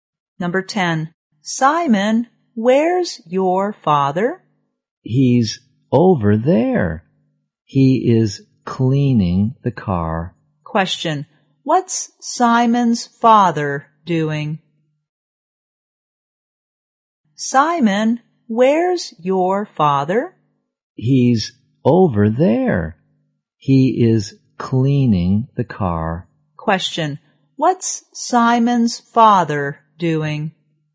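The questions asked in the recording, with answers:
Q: What's Simon's father doing?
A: Cleaning the car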